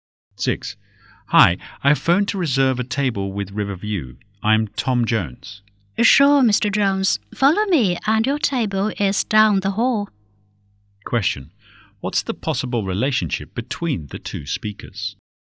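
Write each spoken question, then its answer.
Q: What's the possible relationship between the two speakers?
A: Customer and waiter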